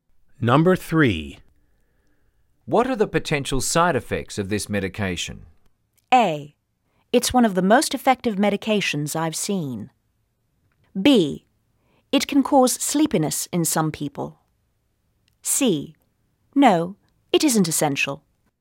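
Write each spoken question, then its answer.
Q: What are the potential side effects of this medication?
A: B: It can cause sleepiness in some people.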